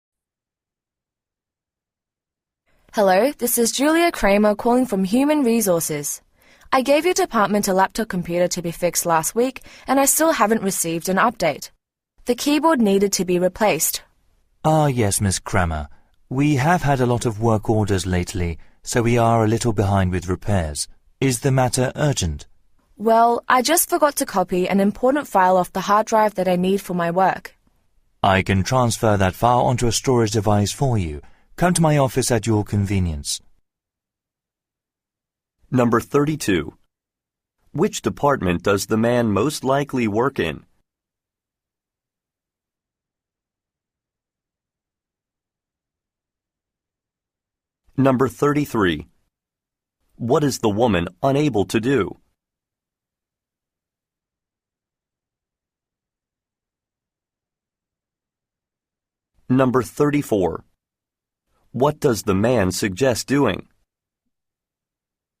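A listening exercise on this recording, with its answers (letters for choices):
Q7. Which department does the man most likely work in?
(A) Human Resources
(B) Accounting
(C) Marketing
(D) Technical Support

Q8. What is the woman unable to do?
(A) Contact a client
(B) Write an e-mail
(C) Access a file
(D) Purchase a laptop computer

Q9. What does the man suggest doing?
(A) Stopping by his office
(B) Enrolling in a class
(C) Replacing a part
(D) Reading a manual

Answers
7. D
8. C
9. A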